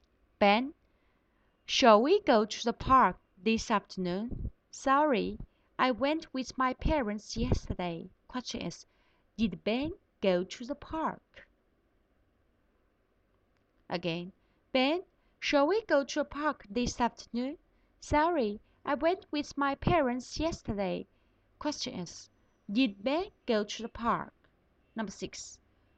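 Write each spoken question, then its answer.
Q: did Ben go to the park?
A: Yes, he went with his parents yesterday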